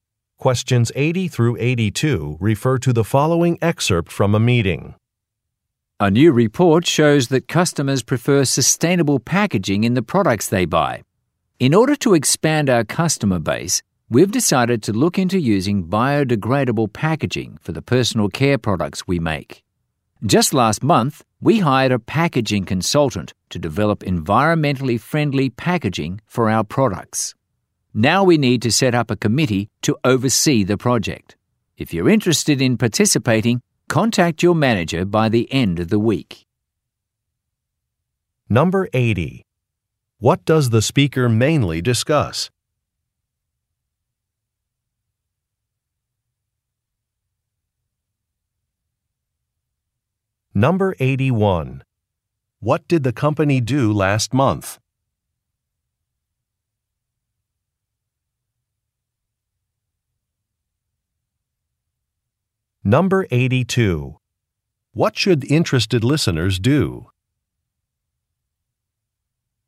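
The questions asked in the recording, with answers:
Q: What does the speaker mainly discuss?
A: Switching to environmentally friendly (biodegradable) packaging

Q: What did the company do last month?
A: Hired a packaging consultant

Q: What should interested listeners do?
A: Contact their manager by the end of the week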